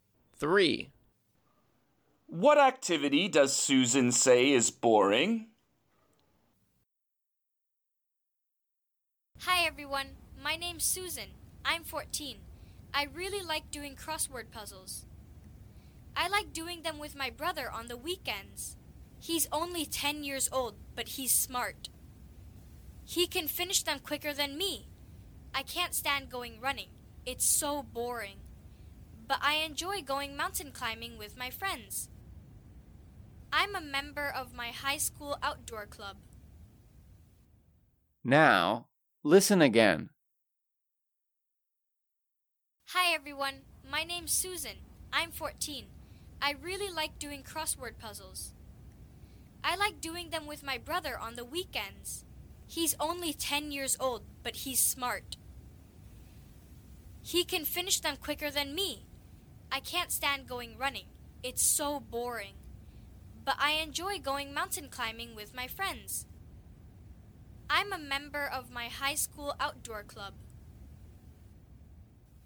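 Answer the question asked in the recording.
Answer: going running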